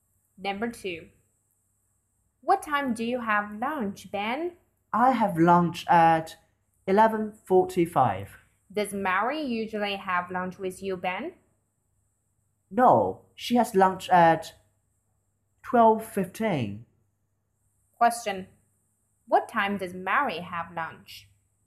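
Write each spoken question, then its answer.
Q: What time does Mary have lunch?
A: At 12:15.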